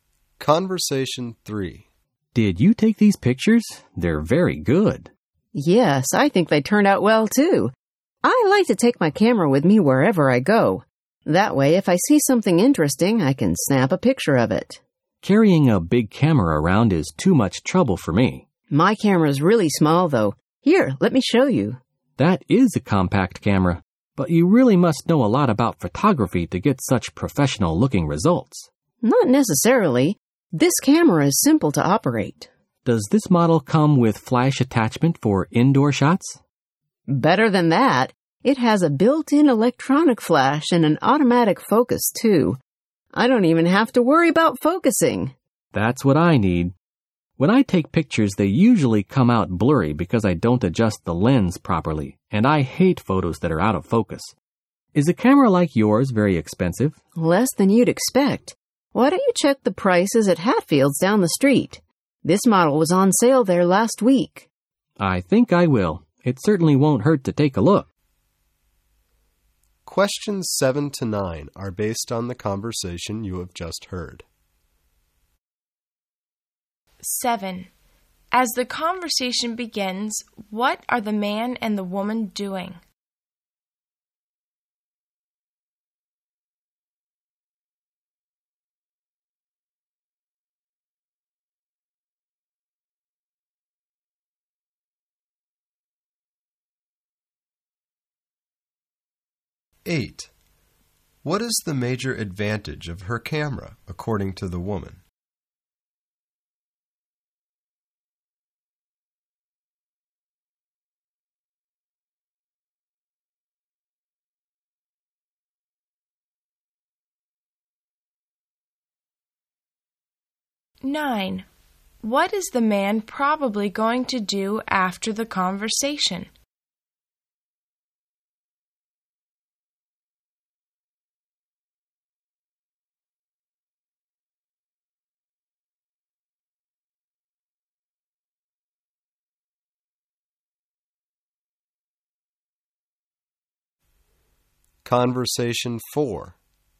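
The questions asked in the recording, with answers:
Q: As the conversation begins, what are the man and the woman doing?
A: Looking at the woman's photos

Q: What is the man probably going to do after the conversation?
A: Check camera prices at Hatfield's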